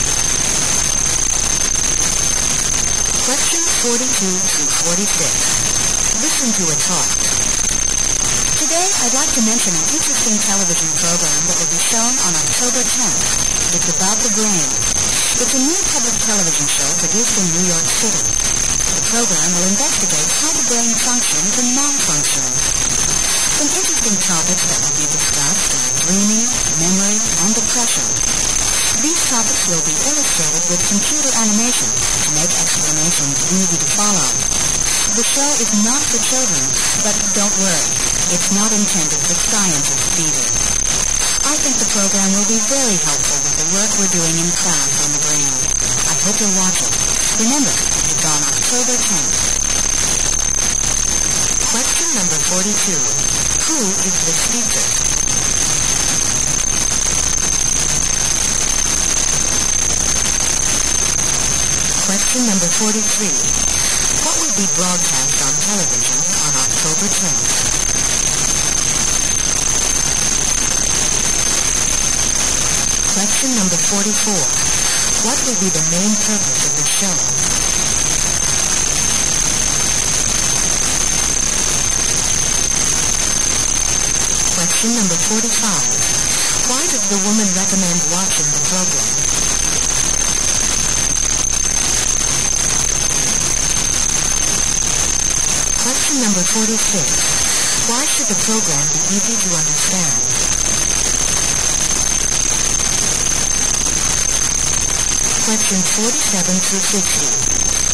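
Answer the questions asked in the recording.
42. A teacher
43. A program about the brain
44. To investigate how the brain functions and malfunctions
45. It will help with the class work on the brain
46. It uses computer animation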